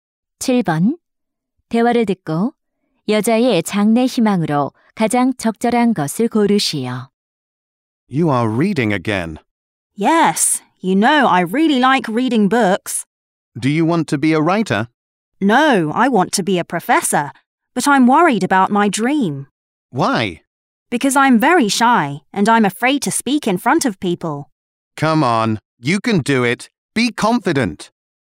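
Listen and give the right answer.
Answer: 교수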